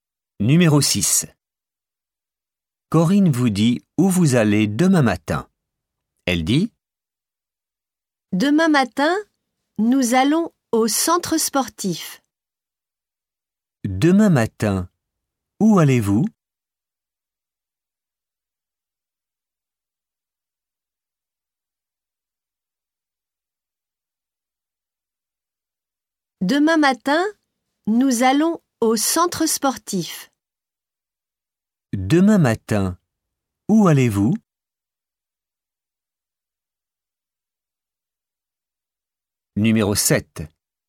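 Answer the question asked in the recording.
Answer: Au centre sportif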